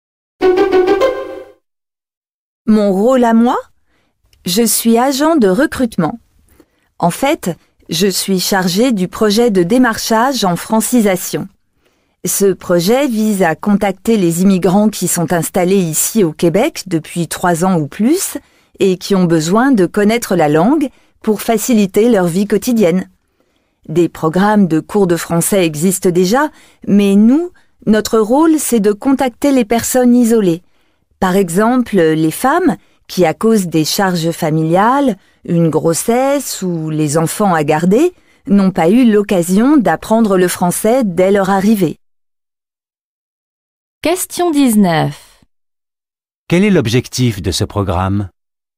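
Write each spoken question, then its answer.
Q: Quel est l'objectif de ce programme?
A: Contacter les immigrants isolés pour qu'ils apprennent le français.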